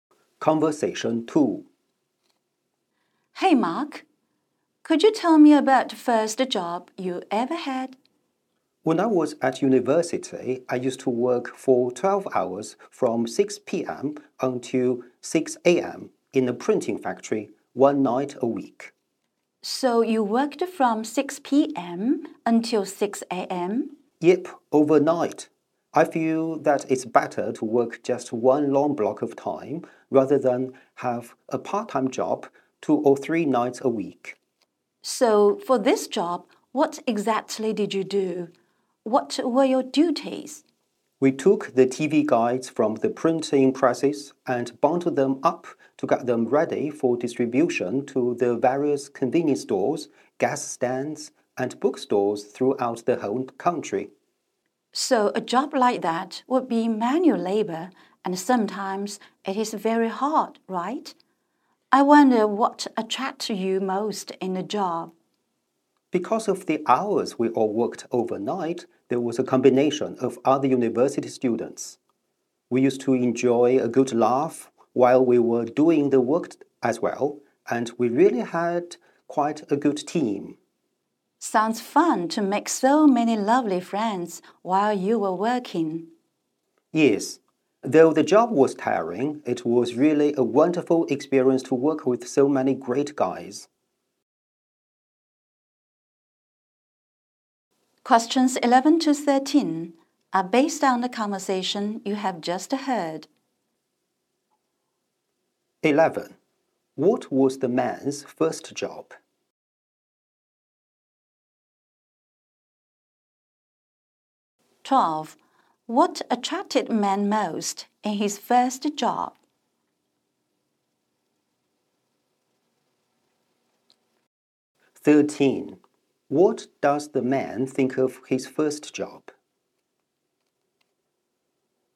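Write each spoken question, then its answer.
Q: What was the man's first job?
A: Working overnight in a printing factory, bundling TV guides

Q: What attracted man most in his first job?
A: Working with a good team of other university students

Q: What does the man think of his first job?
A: Tiring but a wonderful experience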